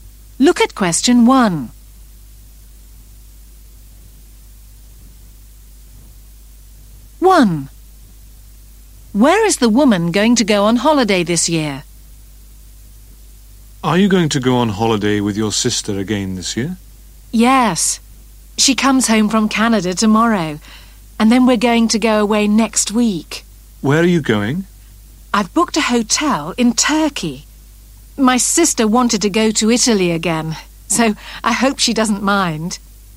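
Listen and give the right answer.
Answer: Turkey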